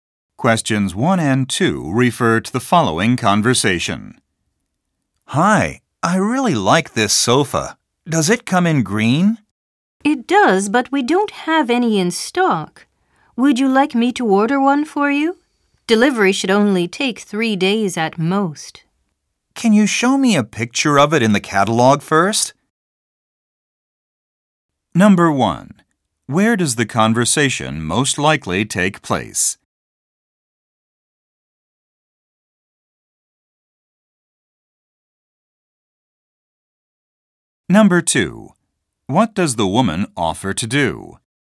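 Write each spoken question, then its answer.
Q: Where does the conversation most likely take place?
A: In a furniture store

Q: What does the woman offer to do?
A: Order a green sofa for him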